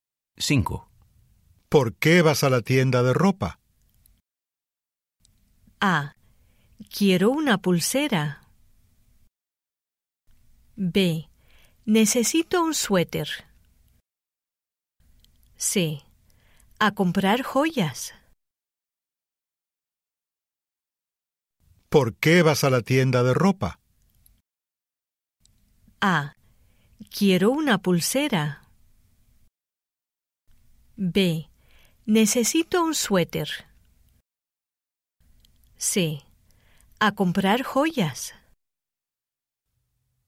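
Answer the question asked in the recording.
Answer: B: Necesito un suéter.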